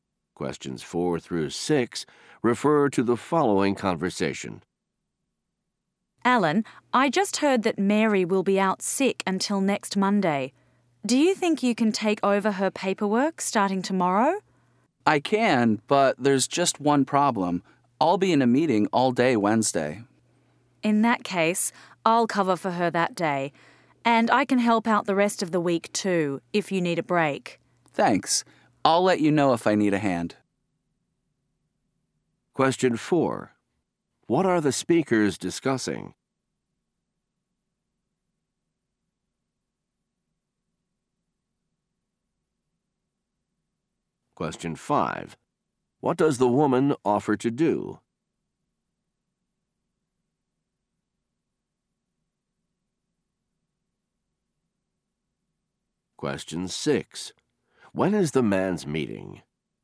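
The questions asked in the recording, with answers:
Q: What are the speakers discussing?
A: Covering a sick coworker's paperwork

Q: What does the woman offer to do?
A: Cover for Mary on Wednesday and help the rest of the week

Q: When is the man's meeting?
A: On Wednesday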